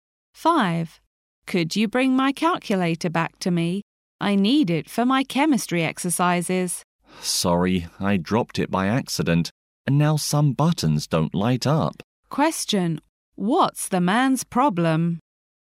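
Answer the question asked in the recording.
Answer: He broke the woman's calculator by accident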